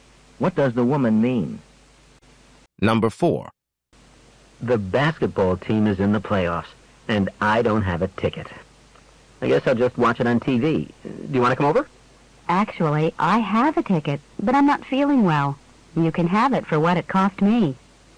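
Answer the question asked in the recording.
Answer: She will sell the man her ticket for what she paid for it.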